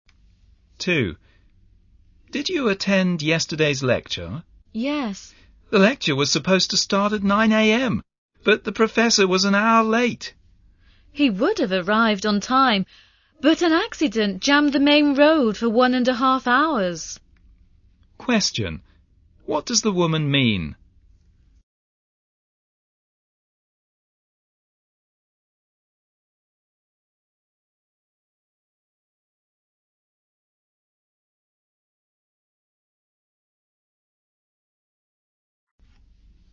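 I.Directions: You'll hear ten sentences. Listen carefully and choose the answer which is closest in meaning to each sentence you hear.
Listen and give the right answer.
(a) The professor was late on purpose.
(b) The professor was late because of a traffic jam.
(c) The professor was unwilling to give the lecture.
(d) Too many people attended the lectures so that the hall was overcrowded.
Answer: (b) The professor was late because of a traffic jam.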